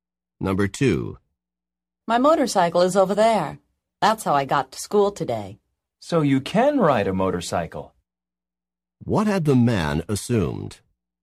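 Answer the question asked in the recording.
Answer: That the woman could not ride a motorcycle.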